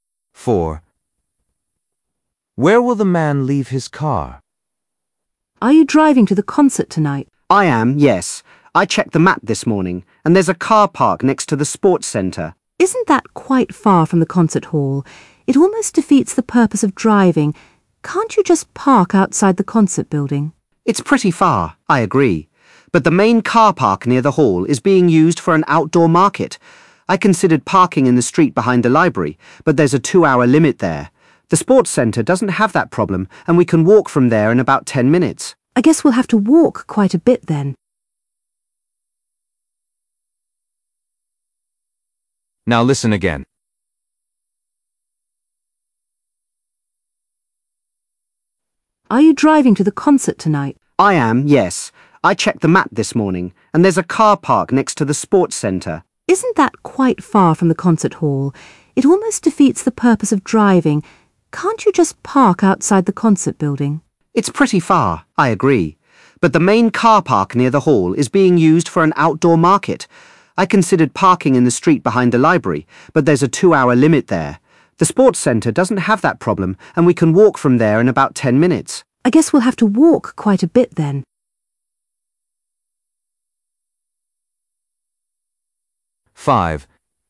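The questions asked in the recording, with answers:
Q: Where will the man leave his car?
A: in the car park next to the sports centre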